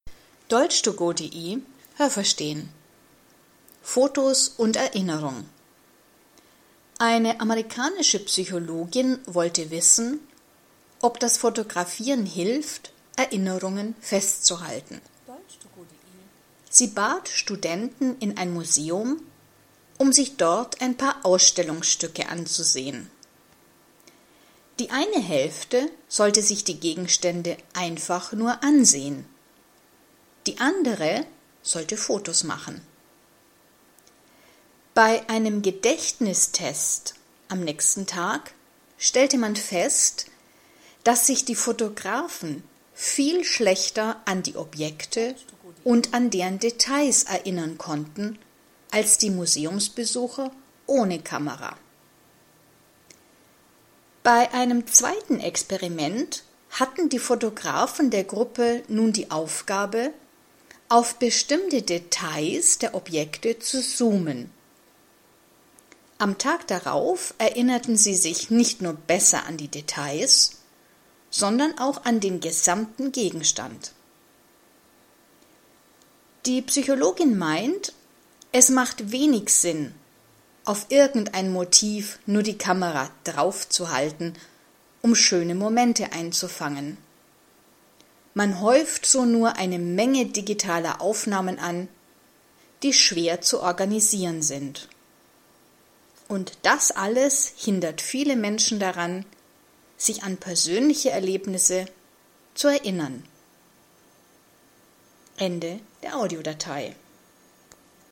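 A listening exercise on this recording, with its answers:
Was haben Sie gehört? Es gibt nur eine korrekte Antwort.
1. Eine amerikanische Psychologin hat untersucht, ob ...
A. man sich besser erinnert, wenn man fotografiert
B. Erinnerungen beim Fotografieren helfen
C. das Fotografieren dem Menschen im Leben hilft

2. Teilnehmer sollten ...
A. ein paar Ausstellungen besuchen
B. ein paar Museen ausprobieren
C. ein paar Gegenstände ansehen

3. Experiment 1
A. Eine Gruppe fotografierte, die andere schaute nur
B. Eine Gruppe schaute nur, die andere schaute sich Fotos an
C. Eine Gruppe schaute sich nur Fotos an, die andere fotografierte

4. Experiment 1 – Ergebnis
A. Fotografen konnten sich besser an die Details erinnern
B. Personen ohne Kameras konnten sich besser an die Details erinnern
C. Ohne Kamera erinnert man sich besser an Objekte, mit Kamera besser an die Details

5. Experiment 2 – Die Fotografen sollten mit ihrer Kamera ...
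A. Details suchen und vergleichen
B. Details genauer ansehen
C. beim Fotografieren summen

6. Experiment 2 – Ergebnis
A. Es gab keinen Unterschied zu Experiment 1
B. Die Fotografen erinnerten sich besser als die Personen ohne Kamera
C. Die Fotografen im Experiment 2 erinnerten sich besser als die Fotografen im Experiment 1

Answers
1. A
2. C
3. A
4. B
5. B
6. C

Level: B2

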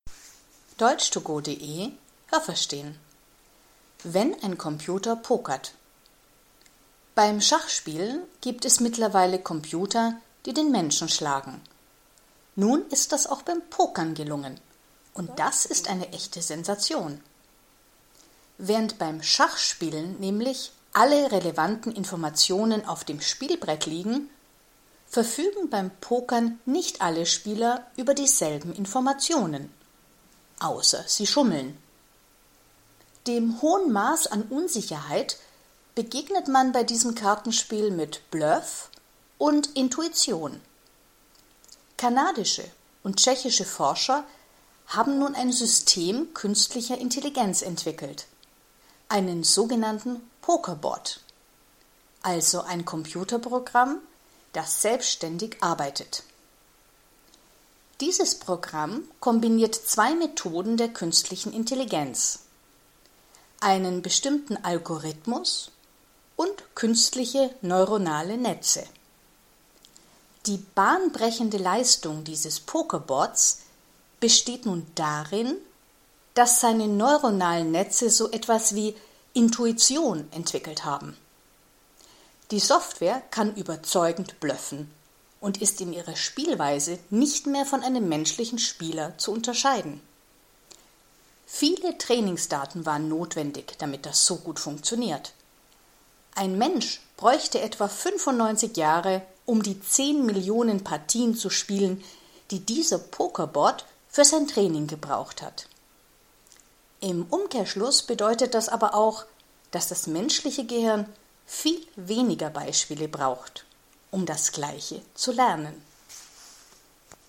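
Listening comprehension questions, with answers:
Was haben Sie gehört? Es gibt nur eine korrekte Antwort.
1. Computer können Menschen ...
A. nur beim Schachspielen besiegen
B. auch beim Pokern besiegen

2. Beim Pokern haben alle Spieler ...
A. dieselben Informationen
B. unterschiedliche Informationen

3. Beim Pokern sind Bluff und Intuition ...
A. genauso wichtig wie beim Schach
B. wichtiger als beim Schachspielen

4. Kanadische Forscher haben mit _____ Forschern zusammengearbeitet.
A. tschechischen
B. technischen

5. Was ist das Besondere an diesem Pokerbot?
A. Sein Algorithmus ist bahnbrechend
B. Seine neuronalen Netze ermöglichen Intuition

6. Wie viele Spiele hat das Computerprogramm hinter sich?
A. 95 Millionen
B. 10 Millionen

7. Wer lernt effektiver?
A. der Pokerbot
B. der Mensch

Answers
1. B
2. B
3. B
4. A
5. B
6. B
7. B

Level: C1

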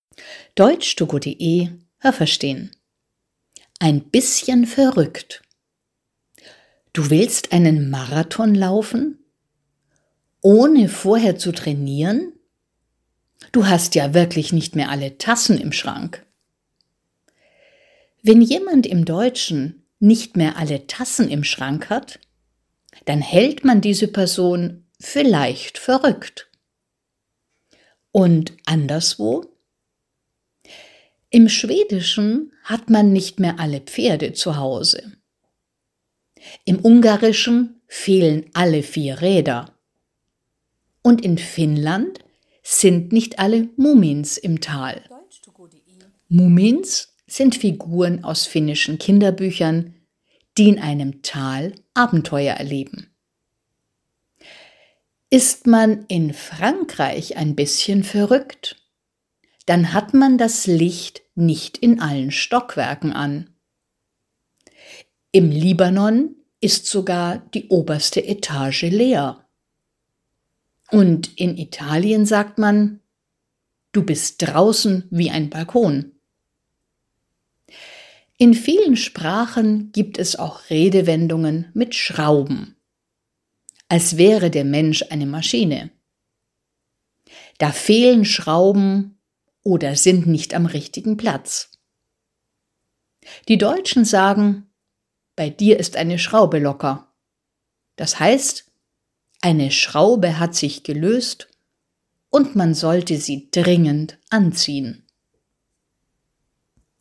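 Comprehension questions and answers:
Was haben Sie gehört? Es gibt nur eine korrekte Antwort.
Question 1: Wer ein bisschen verrückt ist, der hat nicht alle _____ im Schrank.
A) Taschen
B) Tassen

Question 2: Im Schwedischen sagt man, es sind nicht alle _____ zu Hause.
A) Räder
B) Pferde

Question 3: In Finnland gibt es eine Redewendung mit Mumins, Figuren aus einem _____.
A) Kinderbuch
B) Kirchenbuch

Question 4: In Frankreich sagt man: Das Licht ist nicht in allen Stockwerken _____.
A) an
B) aus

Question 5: _____ sagt man: Du bist draußen wie ein Balkon.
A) Im Libanon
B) In Italien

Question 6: In vielen Sprachen gibt es auch Redewendungen mit _____.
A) Maschinen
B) Schrauben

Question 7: Eine deutsche Redewendung heißt: Bei jemandem ist _____.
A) eine Schraube ocker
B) eine Schraube locker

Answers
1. B
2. B
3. A
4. A
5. B
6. B
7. B

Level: A2

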